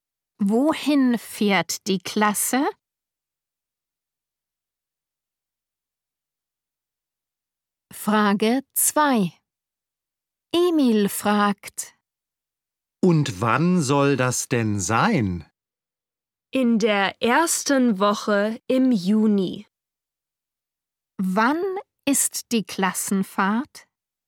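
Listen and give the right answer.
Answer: In der ersten Juniwoche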